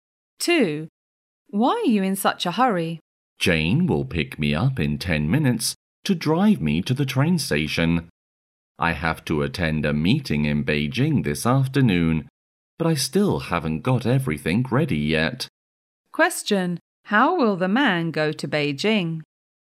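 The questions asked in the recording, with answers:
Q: how will the man go to Beijing?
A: By train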